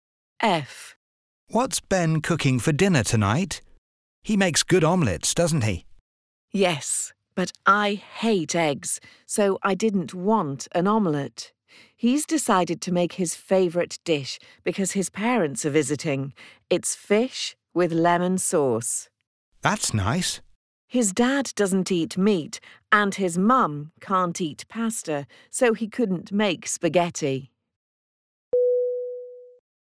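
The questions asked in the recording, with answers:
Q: What's Ben cooking for dinner tonight?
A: Fish with lemon sauce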